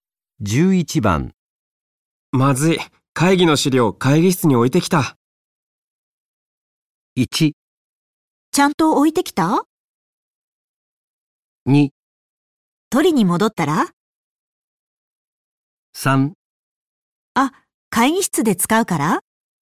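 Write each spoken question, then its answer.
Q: まずい、会議の資料会議室に置いてきた。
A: 2: 取りに戻ったら?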